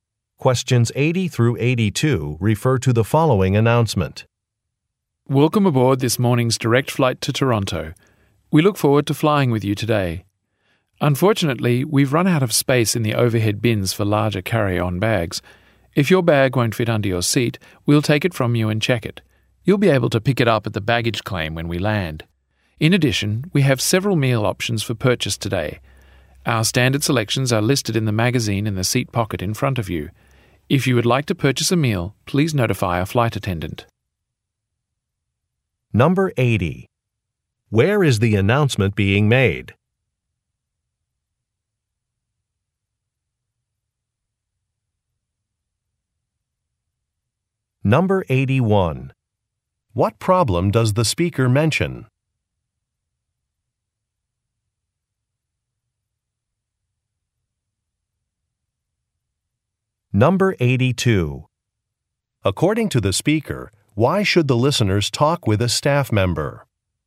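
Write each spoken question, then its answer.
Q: Where is the announcement being made?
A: On an airplane

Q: What problem does the speaker mention?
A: The overhead bins are full

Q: According to the speaker, why should the listeners talk with a staff member?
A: To buy a meal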